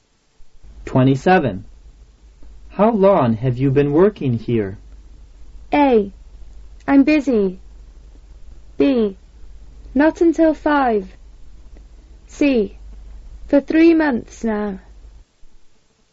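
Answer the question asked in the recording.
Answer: C: For 3 months now.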